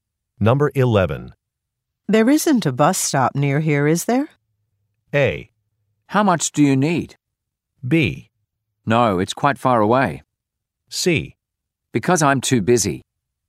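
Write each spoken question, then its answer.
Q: There isn't a bus stop near here, is there?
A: B: No, it's quite far away.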